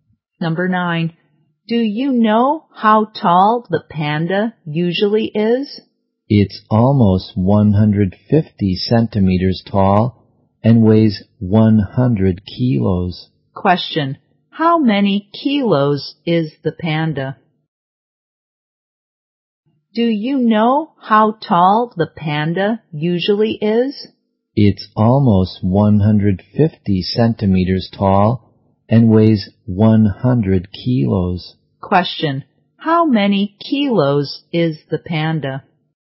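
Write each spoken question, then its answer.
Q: How many kilos is the panda?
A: 100 kilos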